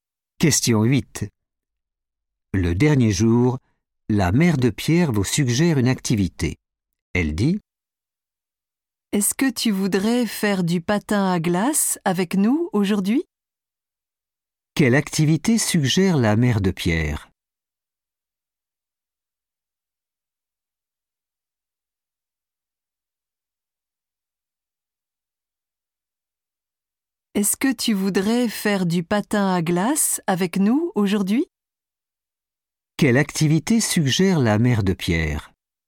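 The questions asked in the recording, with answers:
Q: Quelle activité suggère la mère de Pierre?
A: du patin à glace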